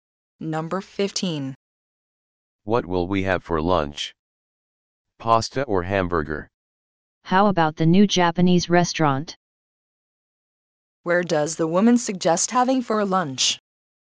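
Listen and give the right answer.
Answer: At the new Japanese restaurant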